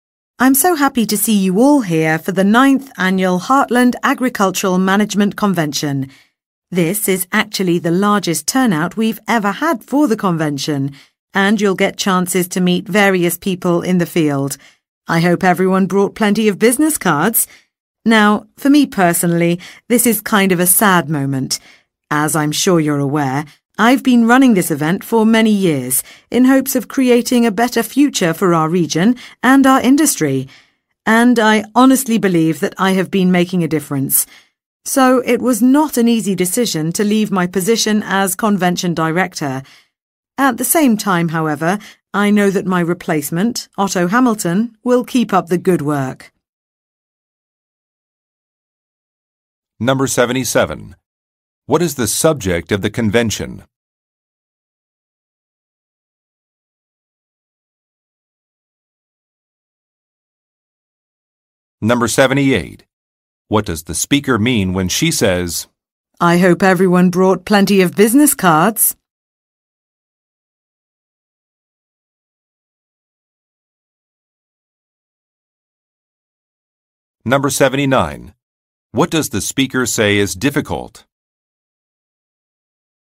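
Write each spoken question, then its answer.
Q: What is the subject of the convention?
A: Agricultural management

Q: What does the speaker mean when she says, I hope everyone brought plenty of business cards?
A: There will be many networking opportunities

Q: What does the speaker say is difficult?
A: Deciding to leave her position as convention director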